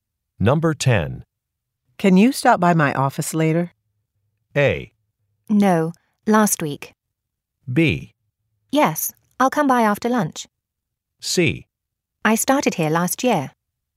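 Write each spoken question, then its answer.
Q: Can you stop by my office later?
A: B: Yes, I'll come by after lunch.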